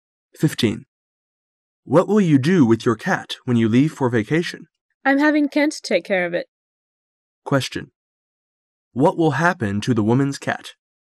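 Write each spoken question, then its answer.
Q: What will happen to the woman's cat?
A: Kent will take care of it

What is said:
[解析] M: What will you do with your cat when you leave for vacation? W: I'm having Kent take care of it.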